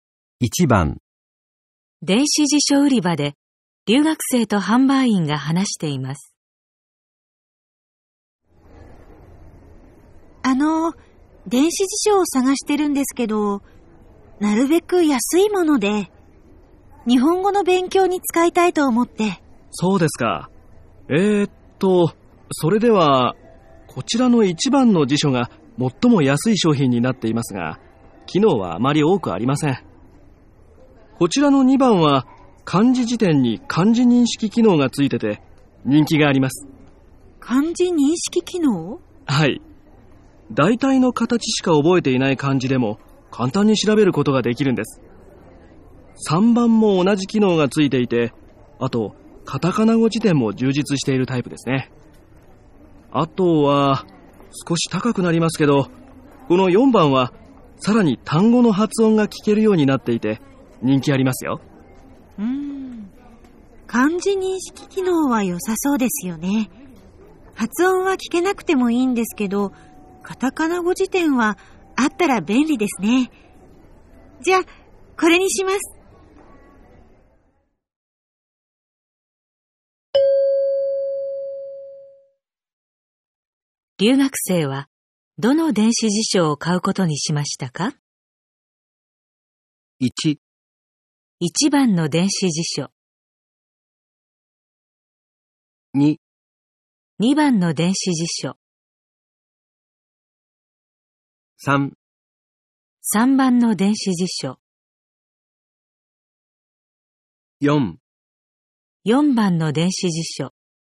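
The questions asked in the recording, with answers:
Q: 留学生はどの電子辞書を買うことにしましたか?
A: 3: 3番の電子辞書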